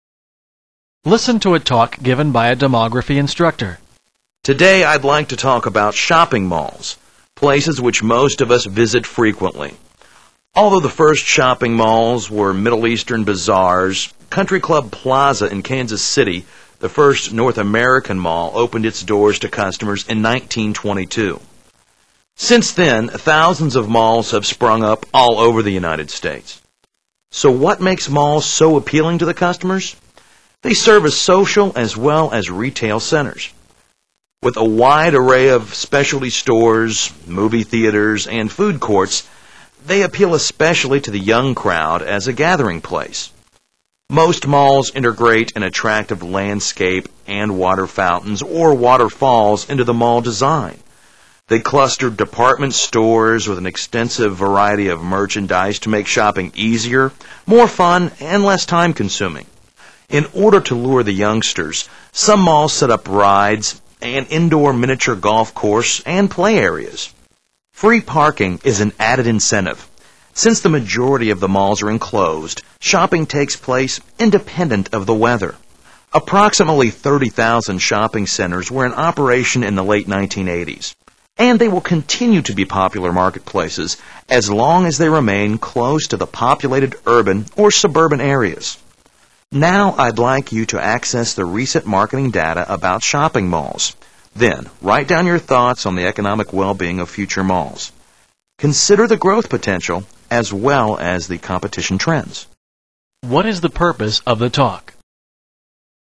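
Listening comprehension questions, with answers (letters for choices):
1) What is the purpose of the talk?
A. To provide general information about malls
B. To discuss investment opportunities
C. To redefine the concept of the malls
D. To credit the landscape consultant firm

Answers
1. A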